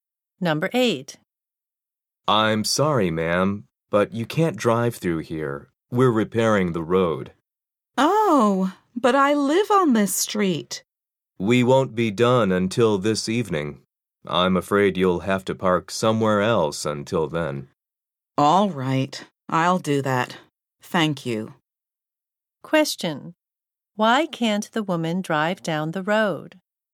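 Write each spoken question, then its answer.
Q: Why can't the woman drive down the road?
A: The road is being repaired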